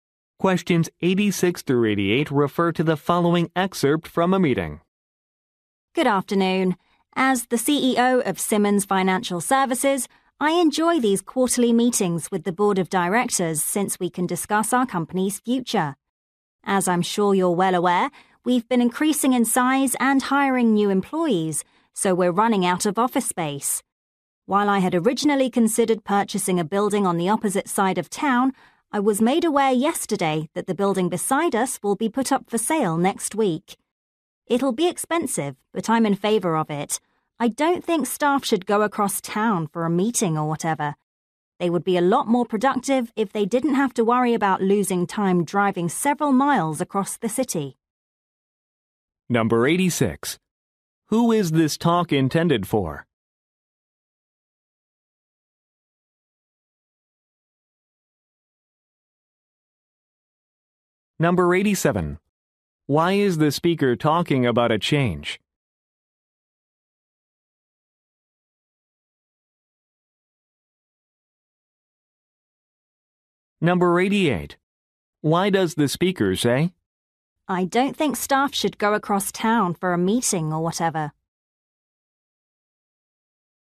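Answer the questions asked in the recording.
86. The board of directors
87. The company is running out of office space
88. To support buying the building next door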